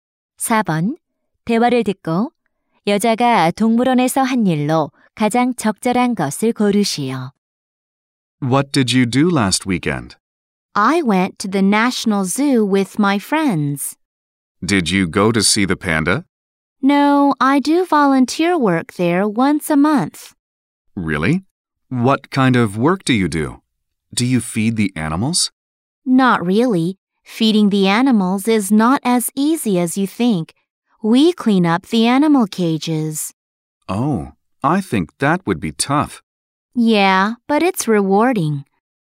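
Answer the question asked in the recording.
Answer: 동물 우리 청소 (자원봉사)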